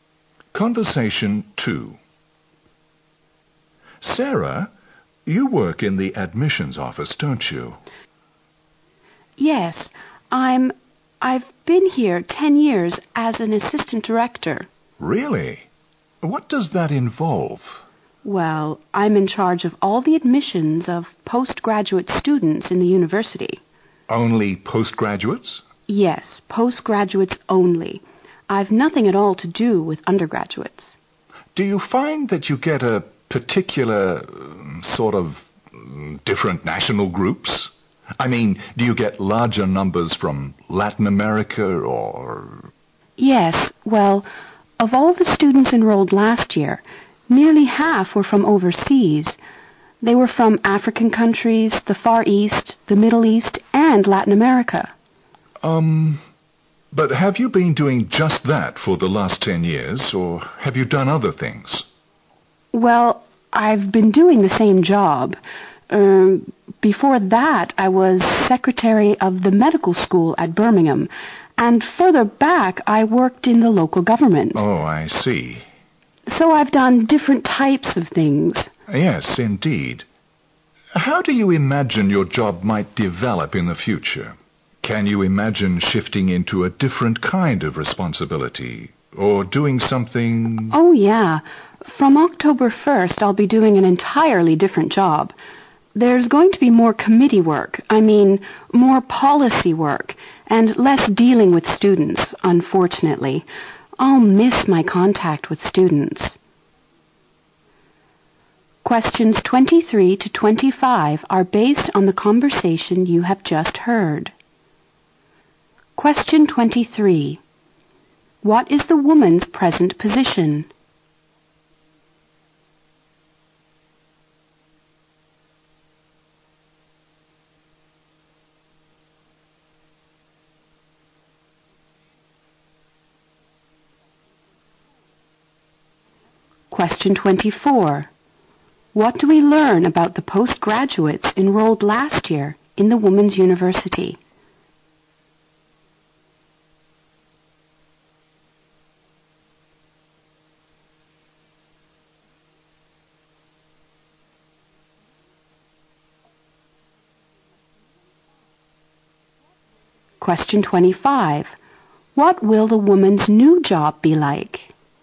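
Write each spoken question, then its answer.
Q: What is the woman's present position?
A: Assistant director of the admissions office

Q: What do we learn about the postgraduates enrolled last year in the Women's University?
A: Nearly half were from overseas.

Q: What will the woman's new job be like?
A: More committee and policy work, and less dealing with students.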